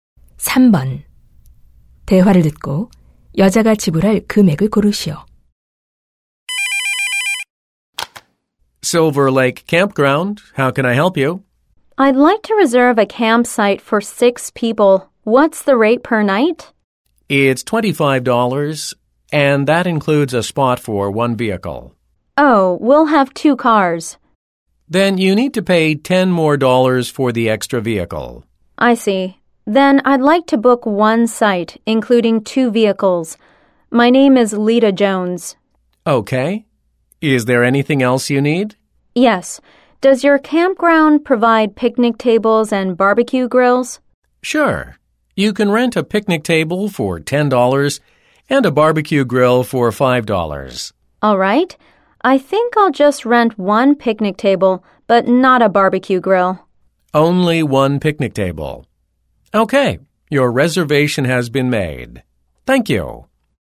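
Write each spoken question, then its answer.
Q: 대화를 듣고 여자가 지불할 금액을 고르시오.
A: $45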